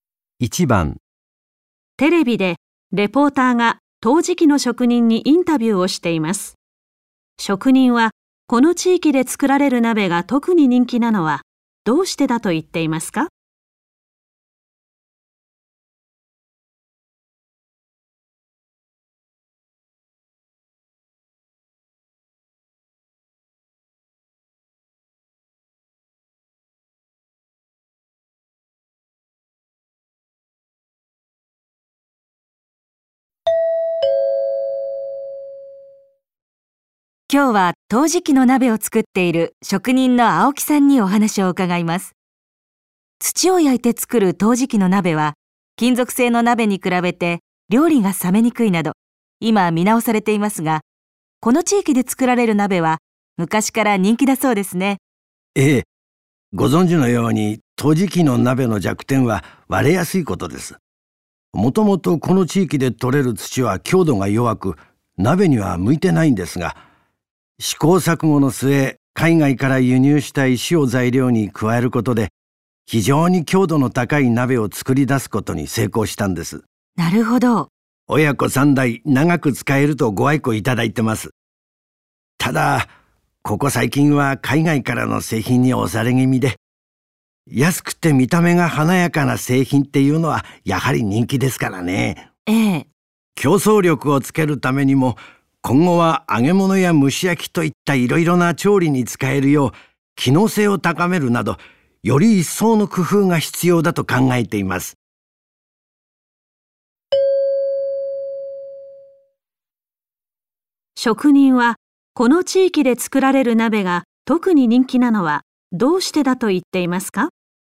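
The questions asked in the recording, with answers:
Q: 職人は、この地域で作られる鍋が特に人気なのはどうしてだと言っていますか?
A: 海外から輸入した石を加えて、強度が高く長く使えるから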